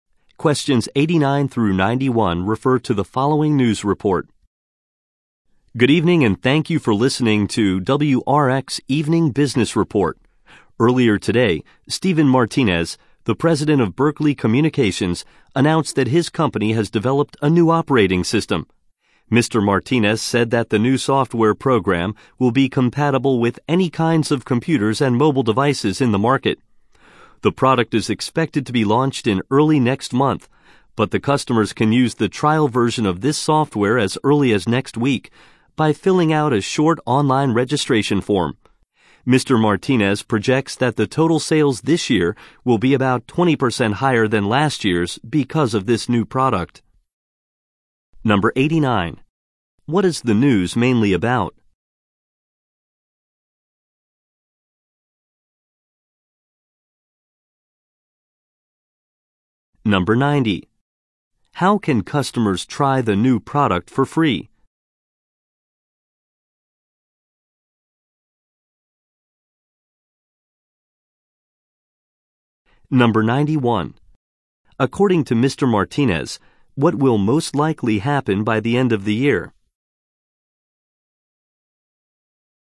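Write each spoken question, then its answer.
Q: What is the news mainly about?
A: A new operating system developed by Berkeley Communications

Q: How can customers try the new product for free?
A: By filling out a short online registration form

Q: According to Mr. Martinez, what will most likely happen by the end of the year?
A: Sales will be about 20% higher than last year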